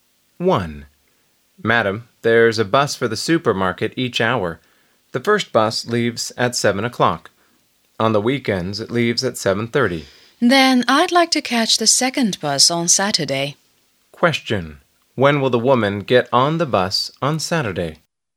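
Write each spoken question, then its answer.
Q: When will the woman get on the bus on Saturday?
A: At 8:30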